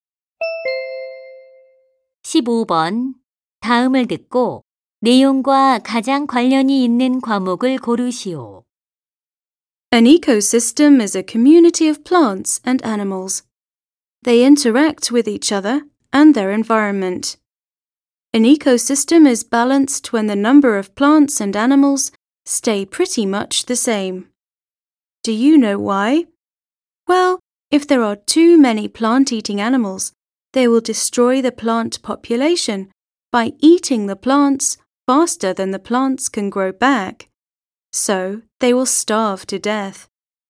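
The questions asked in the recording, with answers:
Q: 다음을 듣고 내용과 가장 관련이 있는 과목을 고르시오.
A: 과학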